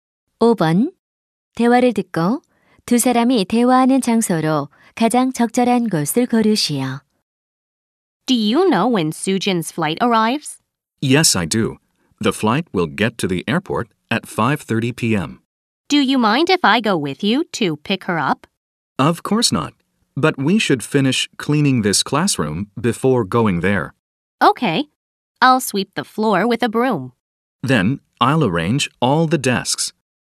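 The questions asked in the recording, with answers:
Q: 대화를 듣고 두 사람이 대화하는 장소로 가장 적절한 곳을 고르시오.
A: 교실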